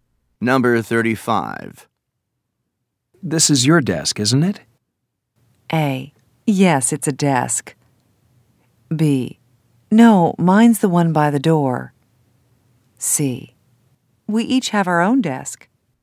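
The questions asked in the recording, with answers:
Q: This is your desk, isn't it?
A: B: No, mine's the one by the door.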